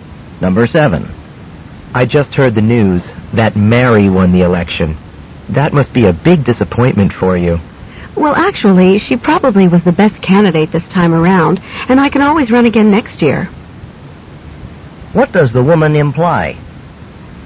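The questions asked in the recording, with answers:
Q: What does the woman imply?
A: She isn't too disappointed about losing and may run again next year.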